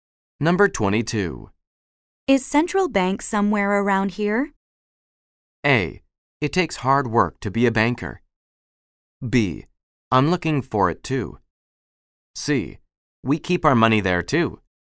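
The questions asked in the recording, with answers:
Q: Is Central Bank somewhere around here?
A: B: I'm looking for it too.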